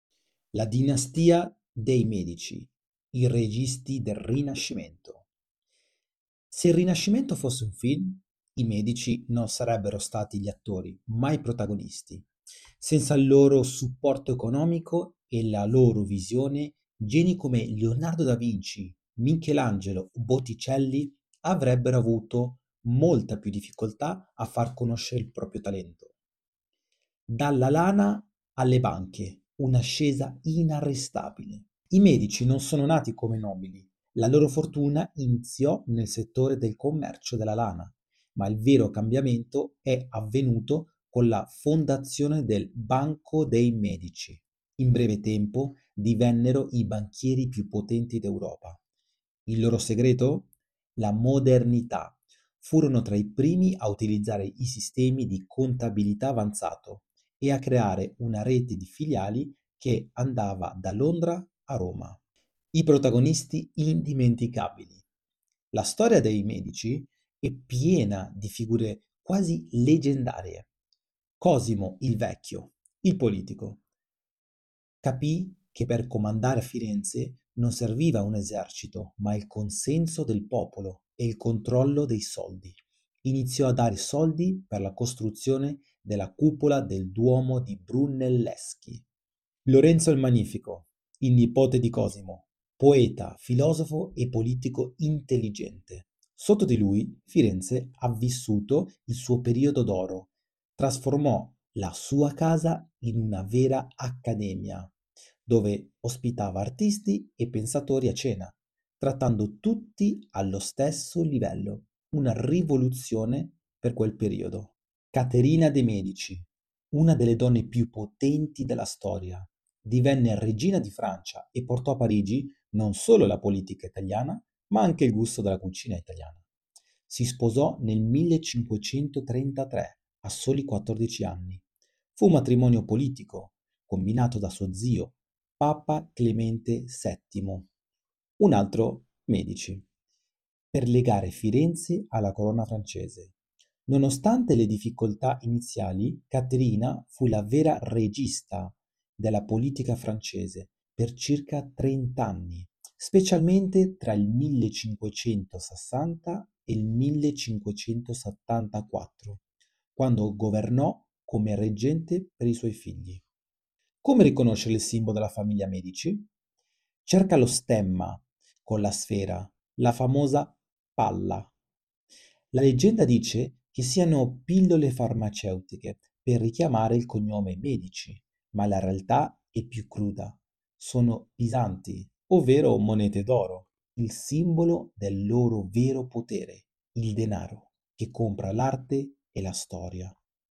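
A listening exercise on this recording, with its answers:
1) Quale fu il settore che segnò il vero salto di qualità economico per la famiglia Medici?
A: La fondazione del Banco dei Medici.

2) Chi fu il responsabile dell'inizio del sostegno economico per la costruzione della Cupola del Duomo di Brunelleschi?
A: Cosimo "il Vecchio".

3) Lorenzo il Magnifico era noto per aver trasformato la sua casa in una sorta di "accademia". Qual era la particolarità di questi incontri?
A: Artisti e pensatori venivano trattati tutti allo stesso livello.

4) A quale età Caterina de' Medici si sposò con il futuro Re di Francia per scopi politici?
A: 14 anni.

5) Cosa rappresentano, secondo l'interpretazione storica più probabile, le "palle" presenti nello stemma dei Medici?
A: Monete che richiamano la loro attività di banchieri.

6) Quale fu l'attività iniziale della famiglia prima di diventare una potenza bancaria?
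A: Il commercio della lana.

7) Quale innovazione tecnica permise ai Medici di gestire il loro impero finanziario in modo moderno?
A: L'utilizzo di sistemi di contabilità avanzata.

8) Quale pontefice della famiglia Medici organizzò il matrimonio di Caterina de' Medici?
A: Papa Clemente VII.

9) Per quanto tempo Caterina de' Medici fu la "regista" della politica francese?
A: Per circa trent'anni.

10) Cosa portò Caterina de' Medici a Parigi oltre alla sua influenza politica?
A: Il gusto della cucina italiana.

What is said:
La Dinastia dei Medici: I Registi del Rinascimento
Se il Rinascimento fosse un film, i Medici non sarebbero stati gli attori, ma i produttori. Senza il loro supporto economico e la loro visione, geni come Leonardo da Vinci, Michelangelo o Botticelli avrebbero avuto molta più difficoltà a far conoscere il proprio talento.
Dalla Lana alle Banche: Un'ascesa inarrestabile
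I Medici non sono nati come nobili... La loro fortuna iniziò nel settore del commercio della lana, ma il vero cambiamento e avvenuto con la fondazione del Banco dei Medici. In breve tempo, divennero i banchieri più potenti d'Europa. Il loro segreto? La modernità. Furono tra i primi a utilizzare sistemi di contabilità avanzato e a creare una rete di filiali che andava da Londra a Roma.
I Protagonisti Indimenticabili
La storia dei Medici è piena di figure quasi leggendarie:
Cosimo "il Vecchio": Il politico. Capì che per comandare a Firenze non serviva un esercito, ma il consenso del popolo e il controllo dei soldi. Iniziò a dare soldi per la costruzione della cupola del Duomo di Brunelleschi.
Lorenzo il Magnifico: Il nipote di Cosimo. Poeta, filosofo e politico intelligente. Sotto di lui, Firenze ha vissuto il suo periodo d'oro. Trasformò la sua casa in una vera "accademia" dove ospitava artisti e pensatori a cena, trattando tutti allo stesso livello, una rivoluzione per quel periodo.
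Caterina de' Medici: Una delle donne più potenti della storia. Divenne Regina di Francia e portò a Parigi non solo la politica italiana, ma anche il gusto della cucina italiana.
Si sposò nel 1533 a soli 14 anni. Fu un matrimonio politico combinato da suo zio, Papa Clemente VII (un altro Medici!), per legare Firenze alla corona francese. Nonostante le difficoltà iniziali, Caterina fu la vera "regista" della politica francese per circa trent'anni, specialmente tra il 1560 e il 1574, quando governò come reggente per i suoi figli.
Come riconoscere il simbolo della famiglia Medici?
Cerca lo stemma con le sfere (le famose "palle"). La leggenda dice che siano pillole farmaceutiche per richiamare il cognome Medici, ma la realtà è più cruda: sono bisanti, ovvero monete d'oro. È il simbolo del loro vero potere: il denaro che compra l'arte e la storia.
Medici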